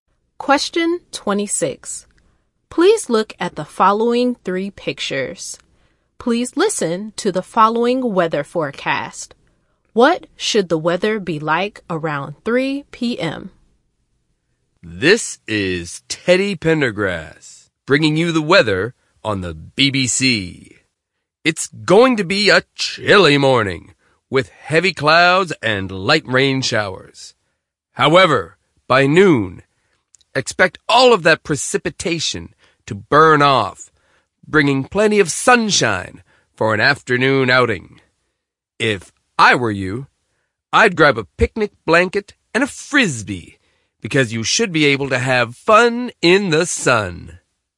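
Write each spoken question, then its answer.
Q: What should the weather be like around 3 p.m.?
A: Sunny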